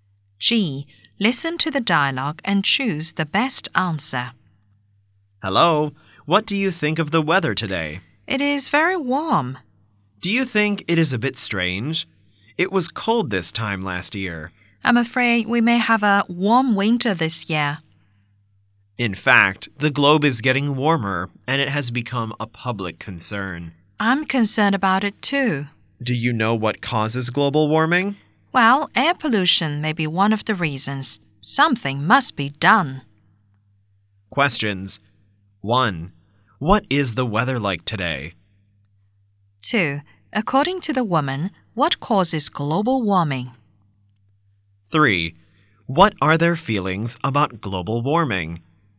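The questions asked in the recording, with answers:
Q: What is the weather like today?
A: Very warm

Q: What are their feelings about global warming?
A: They are concerned about it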